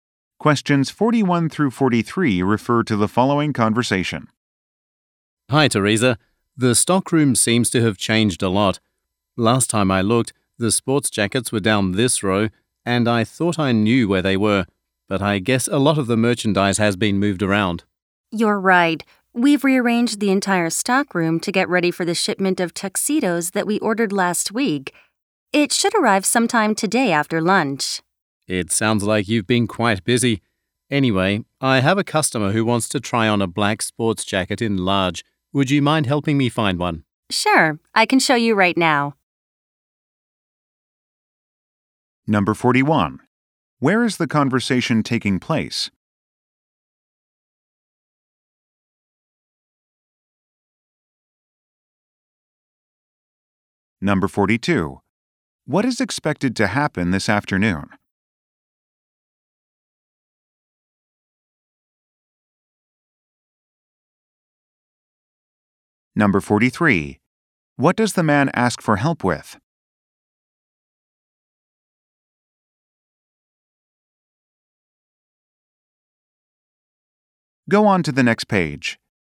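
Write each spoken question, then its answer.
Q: Where is the conversation taking place?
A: In a clothing store stockroom

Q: What is expected to happen this afternoon?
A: A shipment of tuxedos will arrive

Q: What does the man ask for help with?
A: Finding a black sports jacket in large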